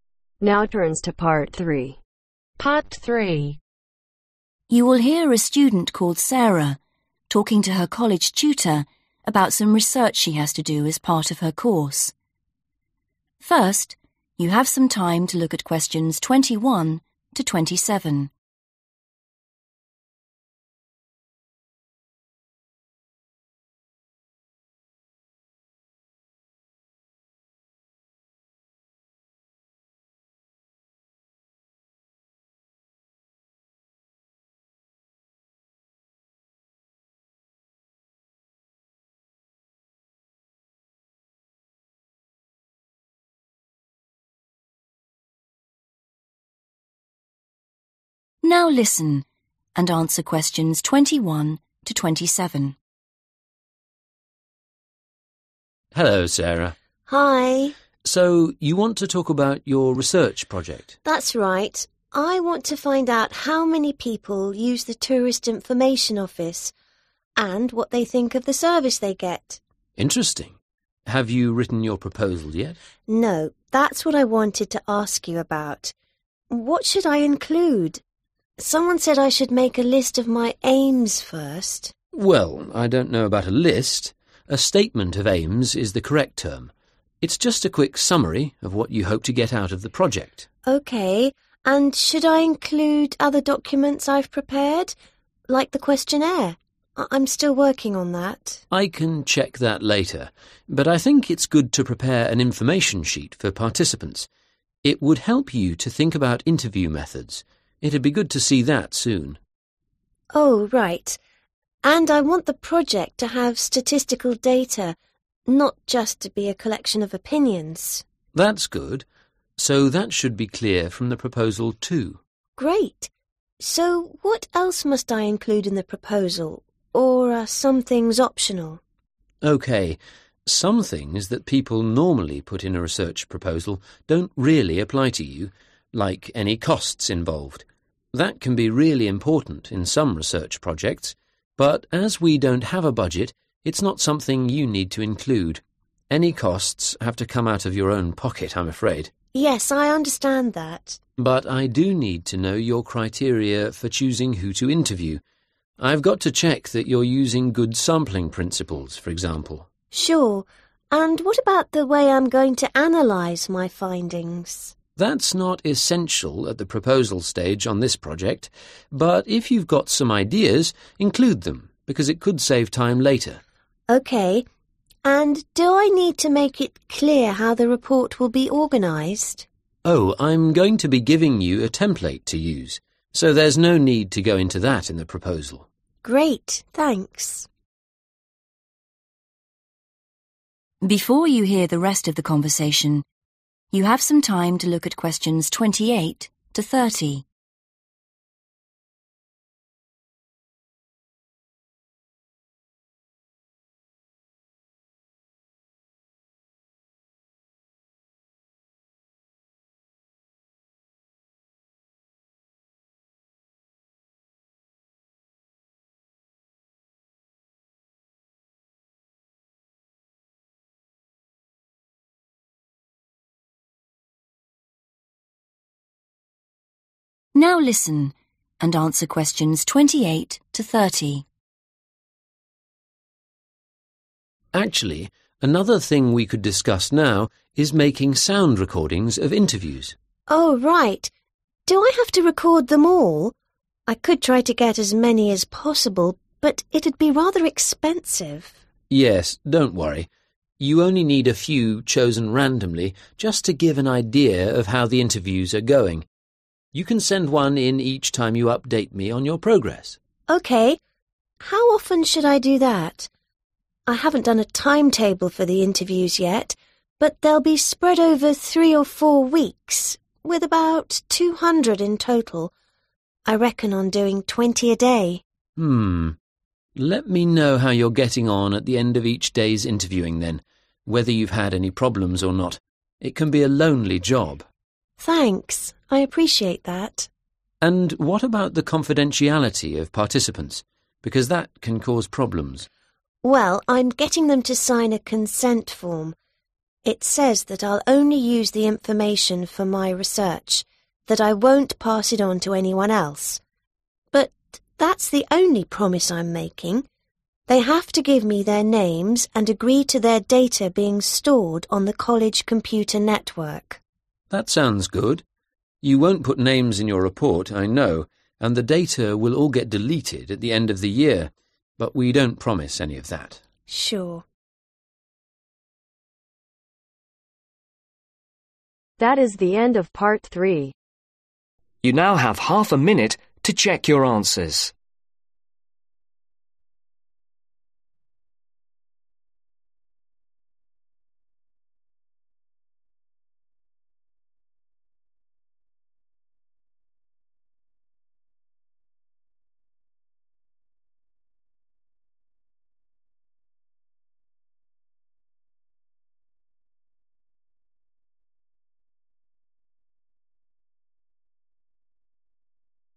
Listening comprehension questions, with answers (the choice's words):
Complete the sentences below. Write NO MORE THAN TWO WORDS for each answer.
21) Sarah's proposal should begin with what's called a 21......... of aims.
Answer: STATEMENT

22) Sarah should prepare what's called an 22 .......... for people taking part.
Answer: INFORMATION SHEET

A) an essential part of the proposal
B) a useful thing to include, but not essential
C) something which shouldn't be included in the proposal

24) how much it will cost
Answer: something which shouldn't be included in the proposal

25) how participants will be chosen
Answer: an essential part of the proposal

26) how the results will be analysed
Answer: a useful thing to include, but not essential

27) how the report will be presented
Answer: something which shouldn't be included in the proposal

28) Sarah agrees to make sound recordings of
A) a random sample of interviews.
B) as many interviews as possible.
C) all the interviews she conducts.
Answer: a random sample of interviews.

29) Sarah will give her tutor updates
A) on a weekly basis.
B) after every twenty interviews.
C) when runs into any problems.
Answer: after every twenty interviews.

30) what will Sarah promise participants?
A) not to put their names in her report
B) not to keep records of their answers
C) not to use the data for other purposes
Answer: not to use the data for other purposes